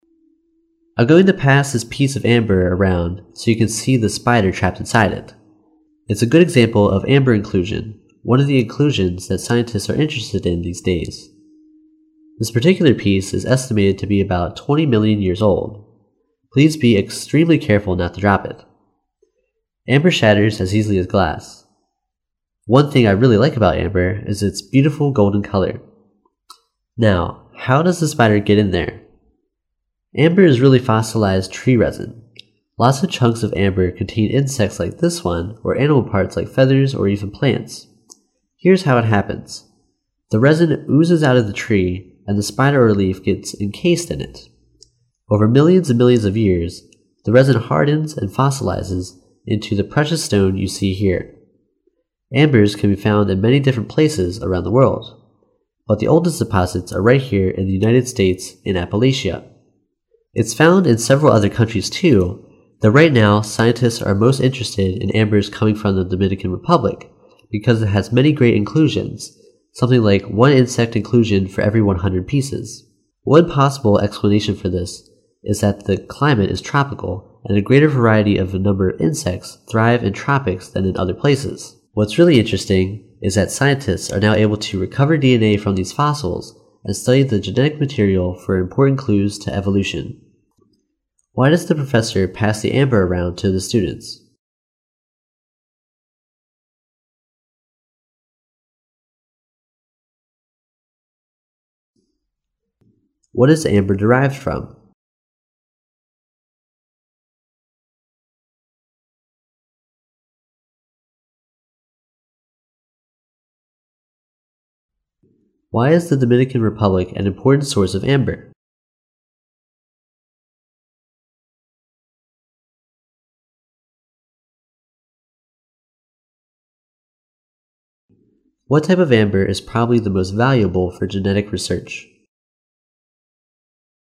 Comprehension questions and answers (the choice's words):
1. What is amber derived from?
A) Tropical insects.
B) Decayed leaves.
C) Tree resin.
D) Bird feathers.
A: Tree resin.

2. Why is the Dominican Republic an important source of amber?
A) Its amber contains numerous fossils.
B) Its amber is the most durable.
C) Its amber is opaque.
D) It is the site of the oldest amber deposits.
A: Its amber contains numerous fossils.

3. What type of amber is probably the most valuable for genetic research?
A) Amber mined from the Appalachian Mountains.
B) Amber with no imperfections.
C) Amber containing organic material.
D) Amber with no inclusions.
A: Amber containing organic material.

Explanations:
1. 细节题。题目问琥珀是如何形成的,根据Amber is really fossilized tree resin. 可知,琥珀其实是树脂化石。因此,正确答案为C。
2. 细节题。根据Because it has a great many inclusions, something likes one insect inclusion for every one hundred pieces. 可知,多米尼加是琥珀的重要产地,多米尼加有大量的化石,每一百片里就有一片含有昆虫的化石。inclusions的意思是"物质、夹杂物"在此联系上下文译为化石。因此,正确答案是A。

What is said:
[听力原文] I'm going to pass this piece of amber around so you can see this spider trapped inside it. It's a good example of amber-inclusion, one of the inclusions that scientists are interested in these days. This particular piece is estimated to be about 20 million years old. Please be extremely careful not to drop it. Amber shatters as easily as glass. One thing I really like about amber is its beautiful golden color. Now, how does the spider get in there? Amber is really fossilized tree resin. Lots of chunks of amber contain insects like this one or animal parts like feathers or even plants. Here is how it happens. The resin oozes out of the tree and the spider or leaf gets in cased in it. Over millions and millions of years, the resin hardens and fossilizes into the precious stone you see here. Ambers can be found in many different places around the world. But the oldest deposits are right here in the United States, in Appalachia. It's found in several other countries, too, though right now scientists are most interested in ambers coming from the Dominican Republic. Because it has a great many inclusions, something likes one insect inclusion for every one hundred pieces. One possible explanation for this it that the climate is tropical and a greater variety of number of insects thrive in tropics than in other places. What's really interesting is the scientists are now able to recover DNA from these fossils and study the genetic material for important clues to revolution.
Why does the professor pass the amber around to the students?